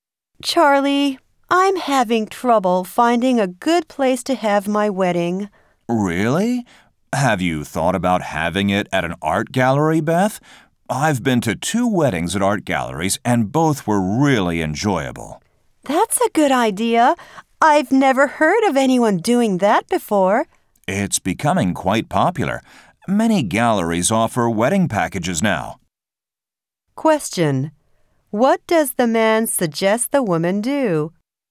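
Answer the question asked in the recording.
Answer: Have her wedding at an art gallery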